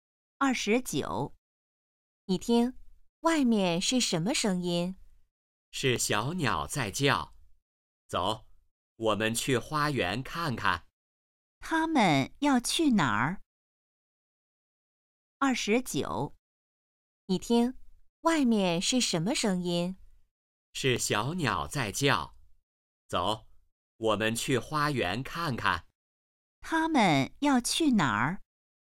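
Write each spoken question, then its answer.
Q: 他们要去哪儿?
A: 花园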